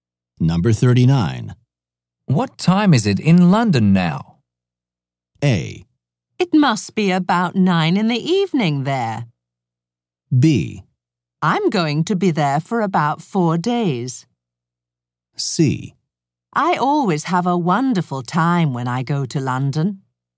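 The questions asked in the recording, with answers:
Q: What time is it in London now?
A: A: It must be about 9 in the evening there.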